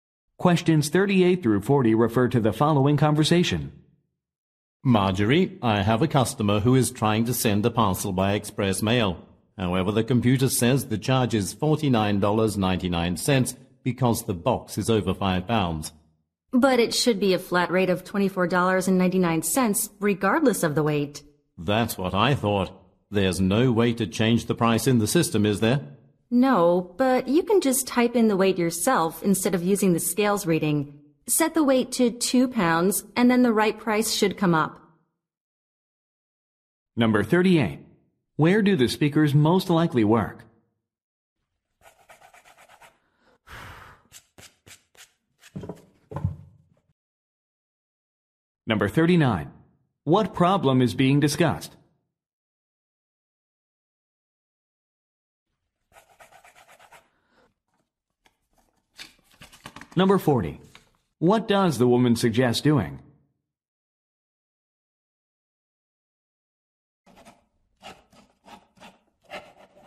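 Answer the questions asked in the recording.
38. At a post office
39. The system shows the wrong price for express mail
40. Typing in the weight manually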